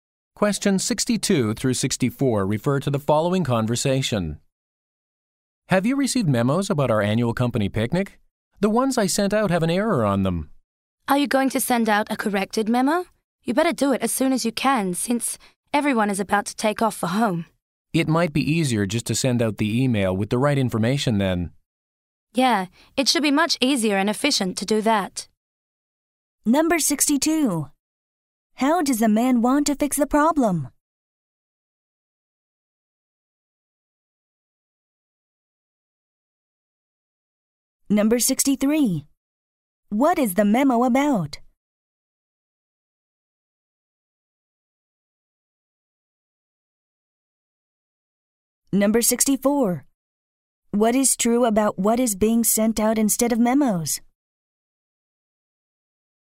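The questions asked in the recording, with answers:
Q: How does the man want to fix the problem?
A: Send an email with the correct information

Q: What is the memo about?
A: The annual company picnic

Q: What is true about what is being sent out instead of memos?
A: It is easier and more efficient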